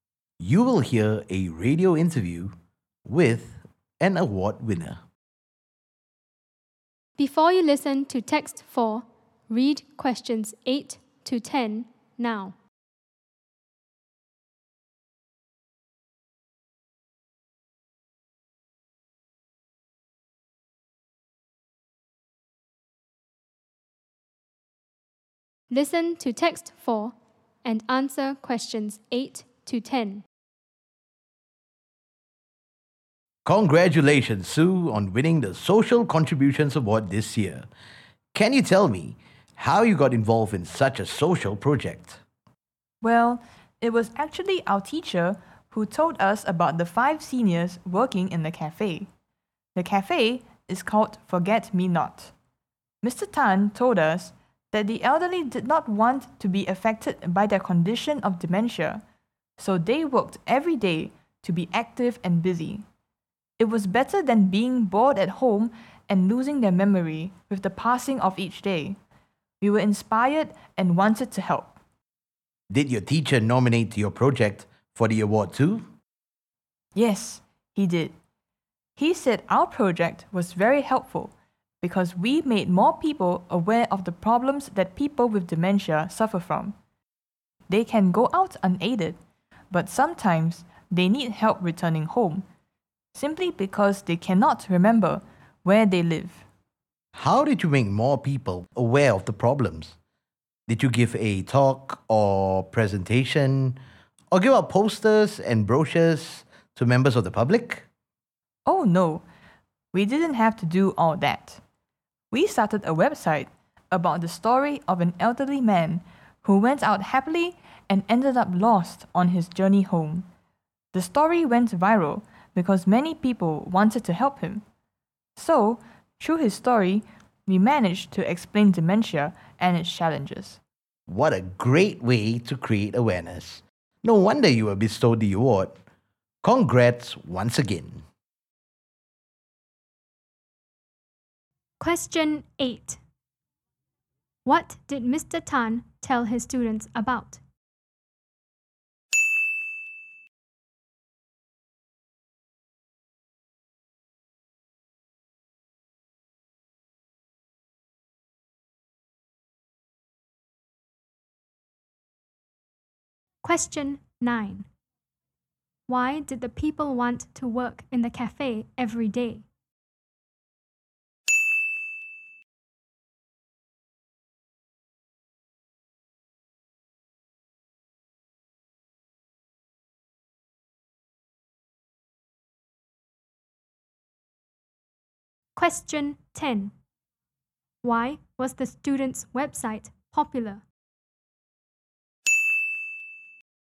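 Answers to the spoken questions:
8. The five seniors with dementia working in the Forget Me Not cafe
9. To stay active and busy so their dementia would not affect them
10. Many people wanted to help the elderly man who got lost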